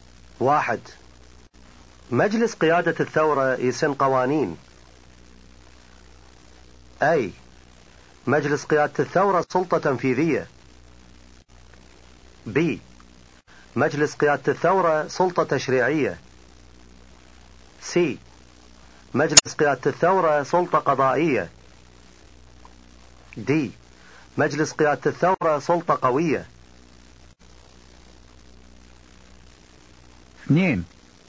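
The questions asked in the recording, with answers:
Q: مجلس قيادة الثورة يسن قوانين.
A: B: مجلس قيادة الثورة سلطة تشريعية.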